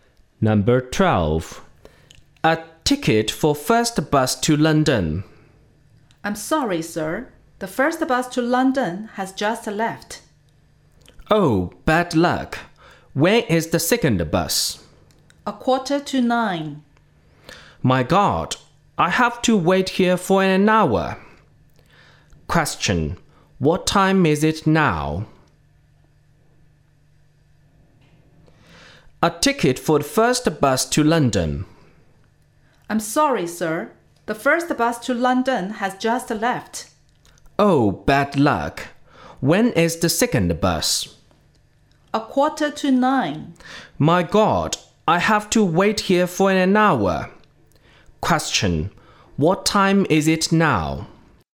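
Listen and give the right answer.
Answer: 8:15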